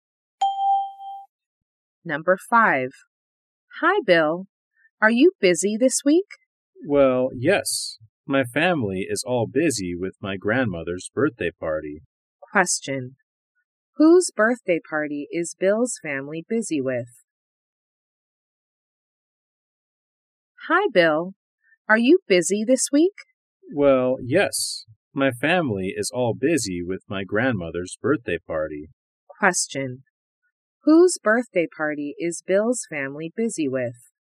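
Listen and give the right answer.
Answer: His grandmother's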